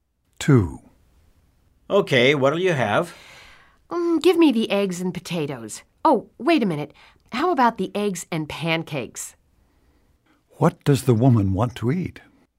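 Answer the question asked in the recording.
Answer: Eggs and pancakes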